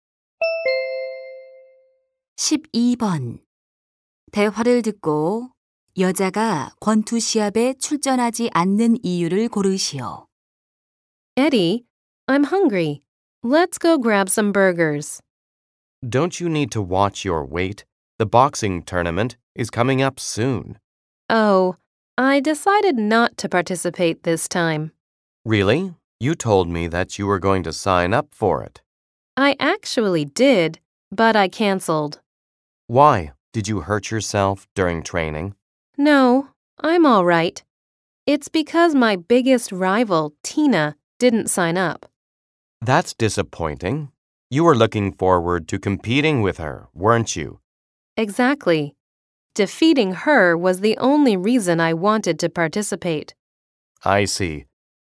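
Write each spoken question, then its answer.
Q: 대화를 듣고 여자가 권투 시합에 출전하지 않는 이유를 고르시오.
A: 최대 라이벌인 Tina가 참가 신청을 하지 않아서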